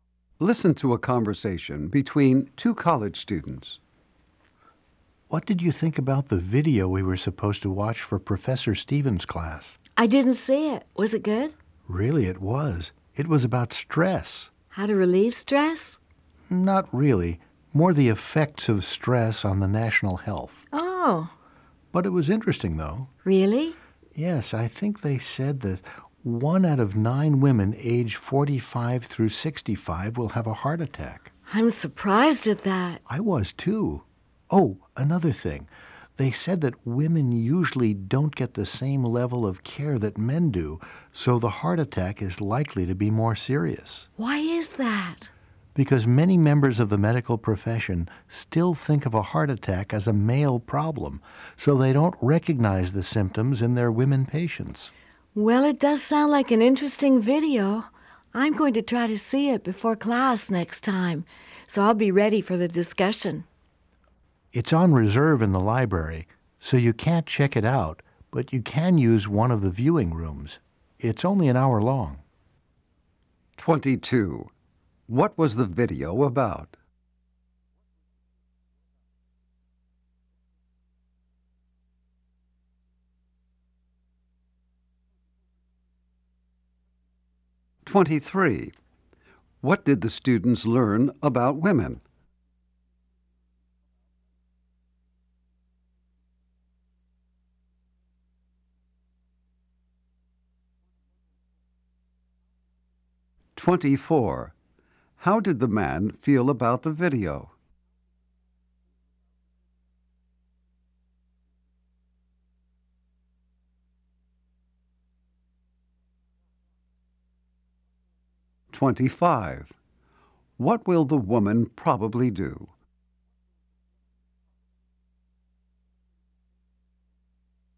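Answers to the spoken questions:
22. The effects of stress on the nation's health
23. They often get less care than men for heart attacks, so their heart attacks may be more serious
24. He thought it was interesting
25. Watch the video in a library viewing room before the next class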